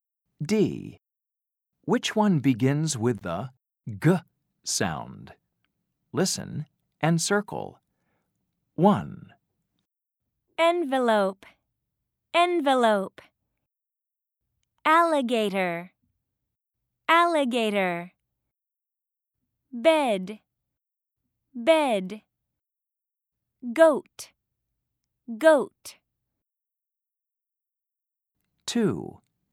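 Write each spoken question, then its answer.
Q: Which one begins with the G sound?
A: Goat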